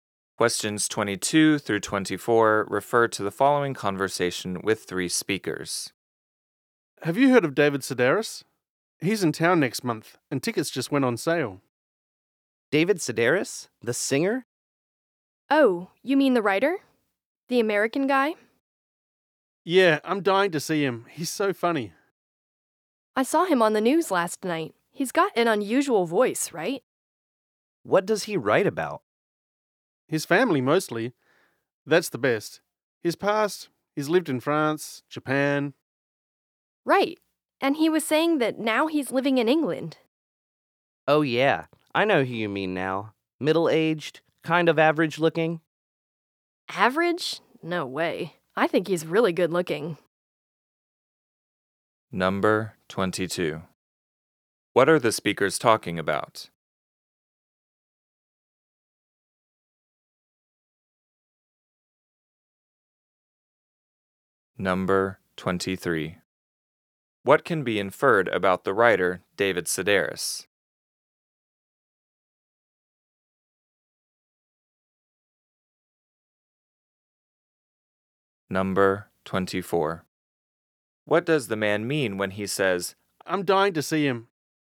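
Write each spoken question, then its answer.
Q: What are the speakers talking about?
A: The writer David Sedaris, who is coming to town next month

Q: What does the man mean when he says,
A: He is very eager to see him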